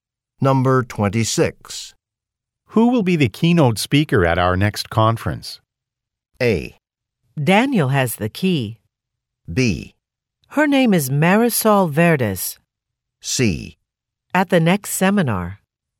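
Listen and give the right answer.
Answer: B: Her name is Marisol Verdes.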